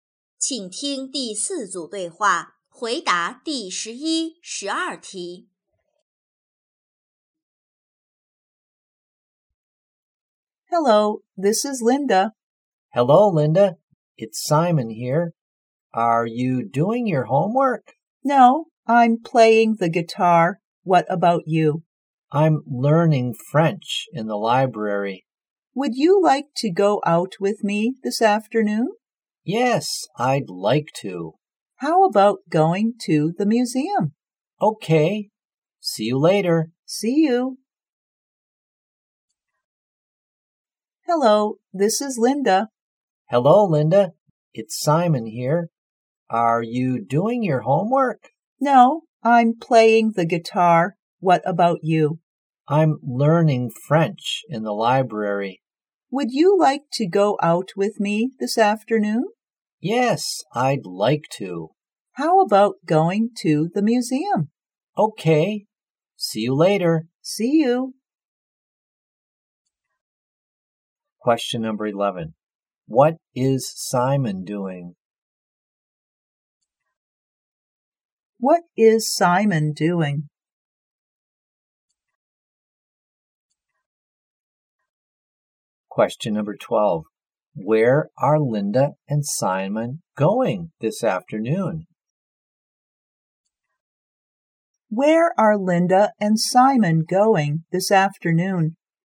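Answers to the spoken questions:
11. Learning French in the library.
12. To the museum.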